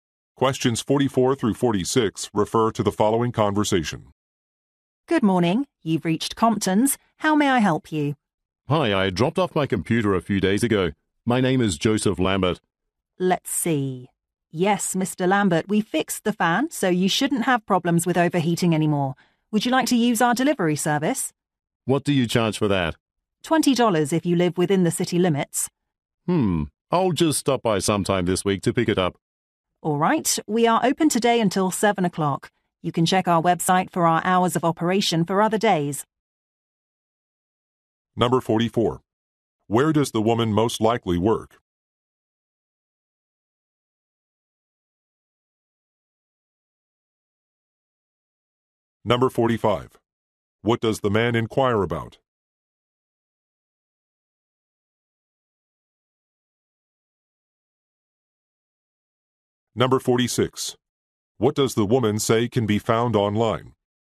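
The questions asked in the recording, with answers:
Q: Where does the woman most likely work?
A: A computer repair shop

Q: What does the man inquire about?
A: The delivery charge

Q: What does the woman say can be found online?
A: Hours of operation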